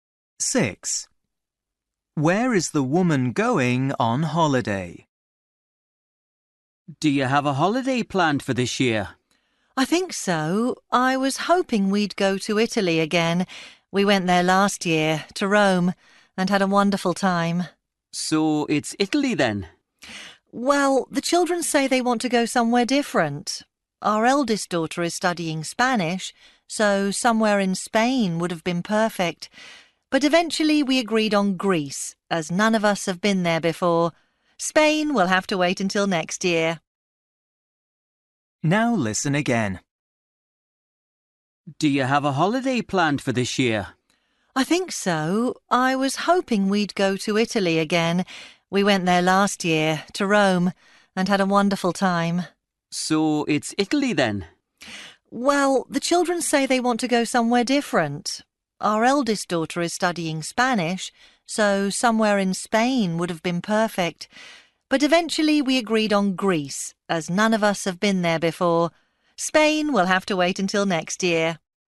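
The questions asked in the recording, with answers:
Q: Where is the woman going on holiday?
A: Greece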